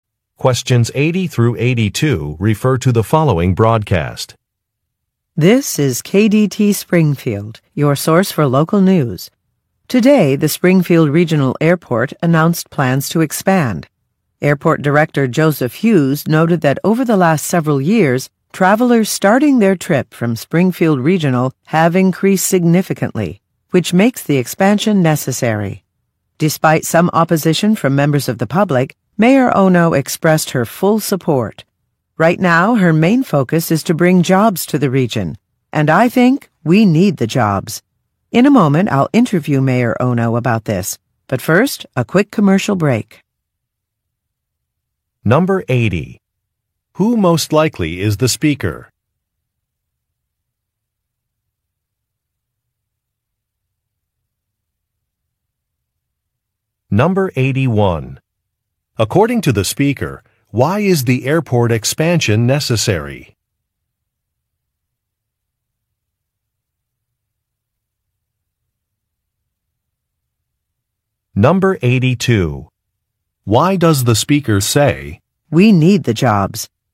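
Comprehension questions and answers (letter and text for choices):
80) Who most likely is the speaker?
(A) A government official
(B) A news reporter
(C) An airline pilot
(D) A construction supervisor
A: (B) A news reporter

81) According to the speaker, why is the airport expansion necessary?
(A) Because a new airline will operate from the airport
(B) Because a nearby airport will be closing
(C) Because most of the airport buildings are old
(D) Because more people are using the airport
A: (D) Because more people are using the airport

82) Why does the speaker say, "we need the jobs"?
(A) To refuse a request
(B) To admit a mistake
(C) To express agreement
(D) To ask for help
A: (C) To express agreement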